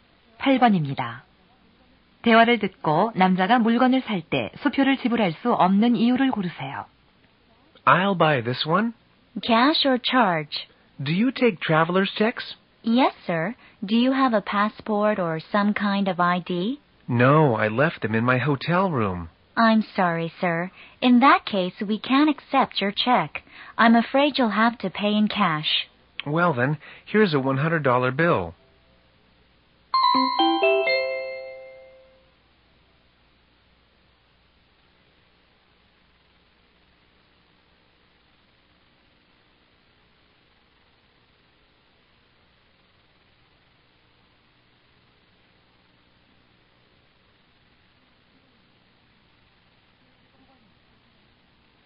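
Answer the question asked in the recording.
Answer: 여권이나 신분증이 없어서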